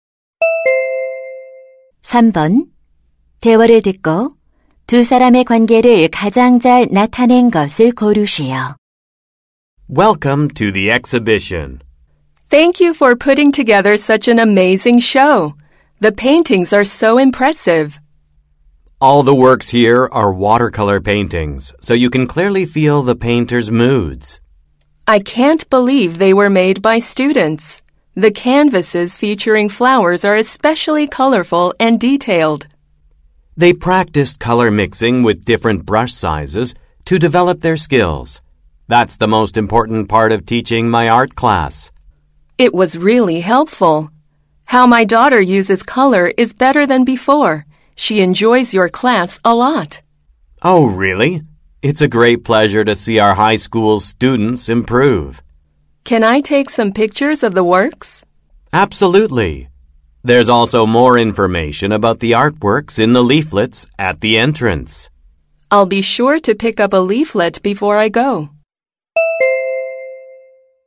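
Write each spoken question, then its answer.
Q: 대화를 듣고 두 사람의 관계를 가장 잘 나타낸 것을 고르시오.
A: 미술 교사 - 학부모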